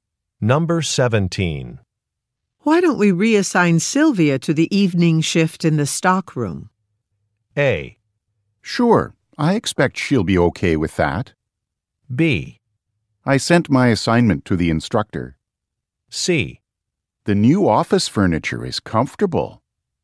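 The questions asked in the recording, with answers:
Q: Why don't we reassign Sylvia to the evening shift in the stockroom?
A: A: Sure, I expect she'll be okay with that.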